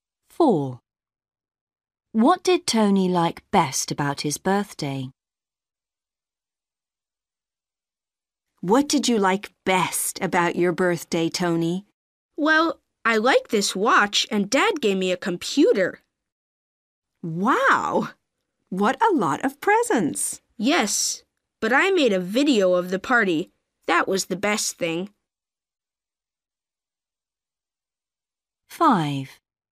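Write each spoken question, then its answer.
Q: What did Tony like best about his birthday?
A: making a video of the party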